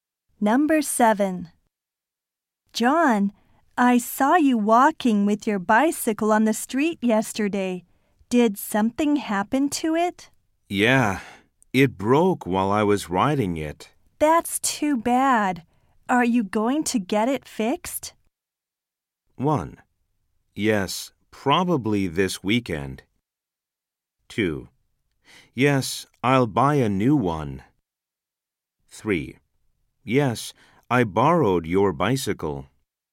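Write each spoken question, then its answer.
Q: That's too bad. Are you going to get it fixed?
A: 1: Yes, probably this weekend.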